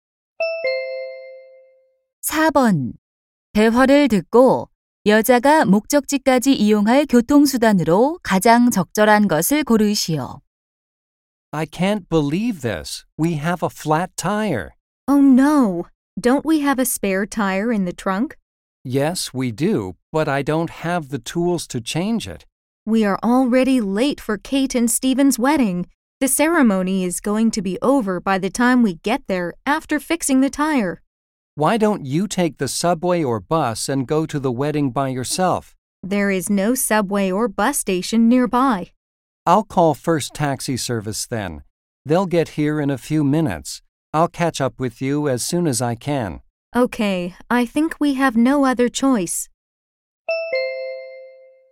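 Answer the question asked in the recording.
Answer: 택시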